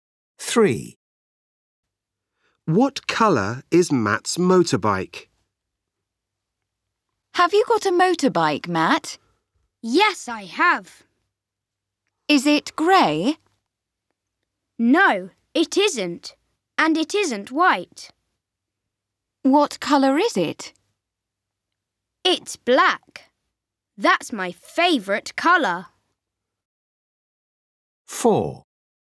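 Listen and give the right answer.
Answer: Black.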